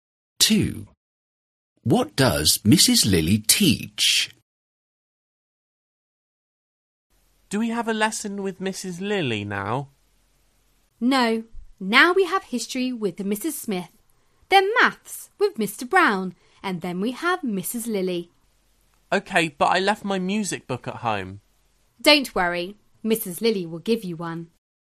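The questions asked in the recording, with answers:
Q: What does Mrs. Lily teach?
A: Music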